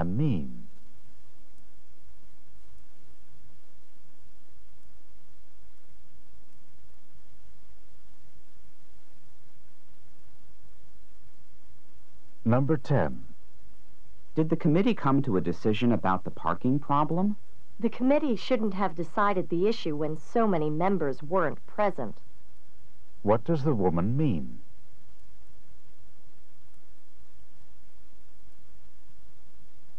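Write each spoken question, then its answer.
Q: What does the woman mean?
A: The committee decided, but it shouldn't have with so many members absent.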